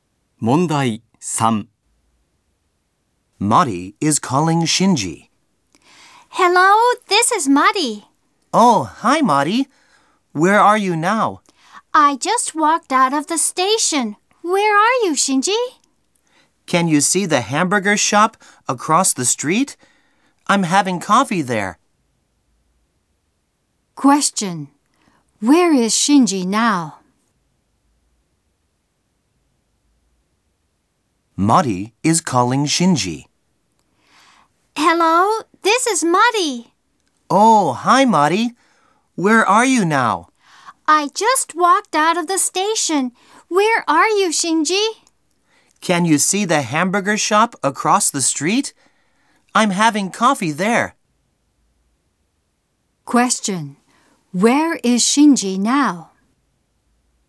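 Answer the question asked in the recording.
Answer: At the hamburger shop across the street from the station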